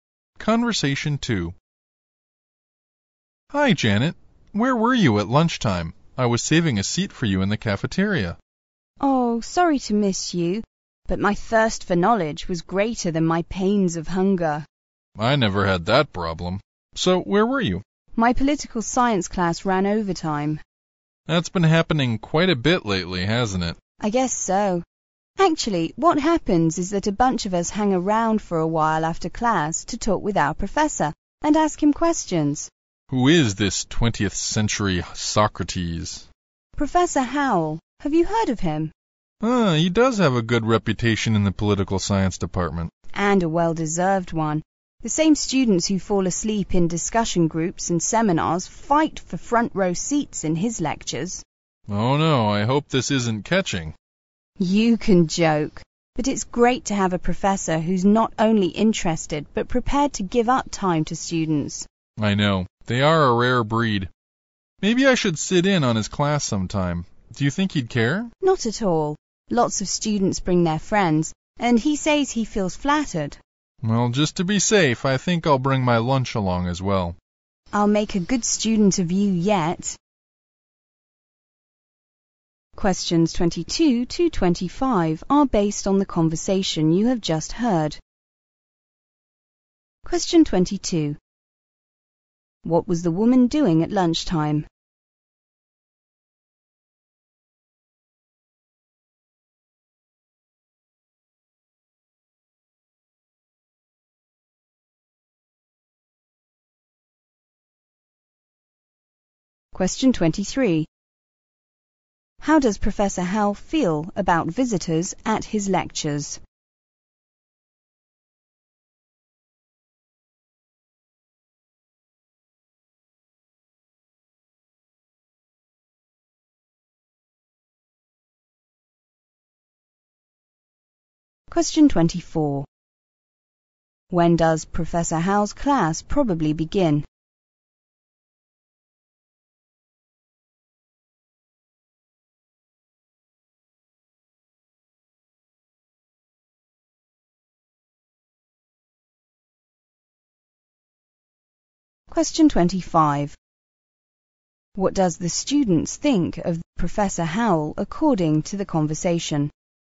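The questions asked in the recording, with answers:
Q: What was the woman doing at lunchtime?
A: Staying after her political science class to talk with the professor

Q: How does Professor Howe feel about visitors at his lectures?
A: Flattered

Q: What does the students think of Professor Howell according to the conversation?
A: They think highly of him; his lectures are very popular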